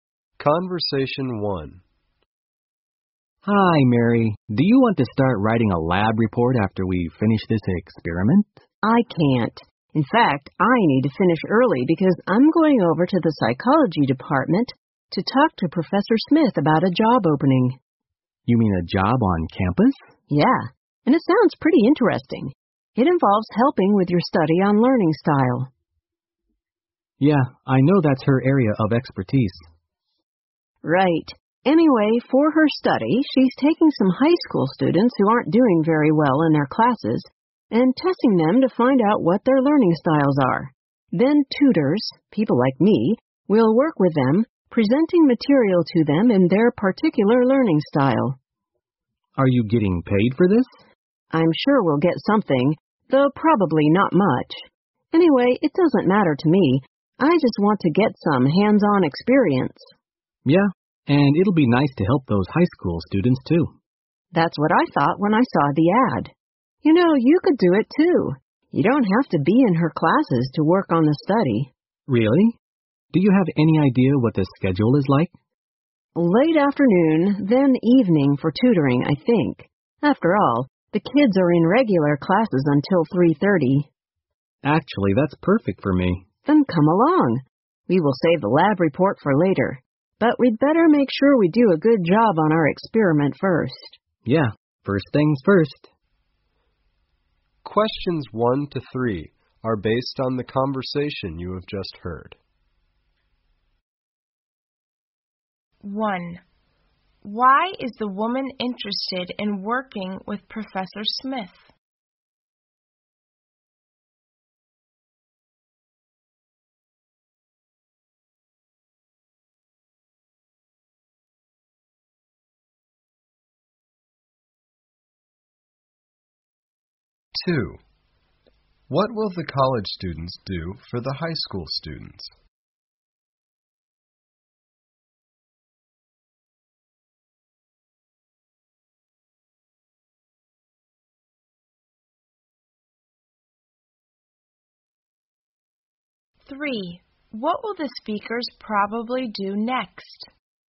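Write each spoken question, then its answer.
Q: Why is the woman interested in working with Professor Smith?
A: To get hands-on experience

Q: What will the college students do for the high school students?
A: Tutor them in their particular learning style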